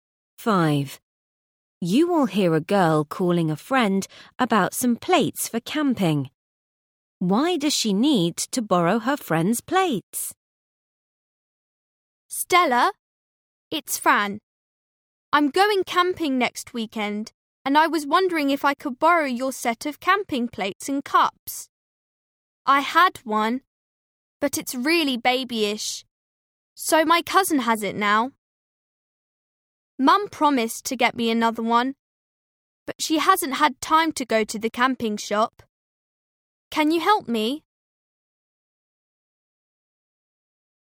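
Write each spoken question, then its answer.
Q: Why does she need to borrow her friend's plates?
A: she gave her babyish set to her cousin and hasn't got a new one yet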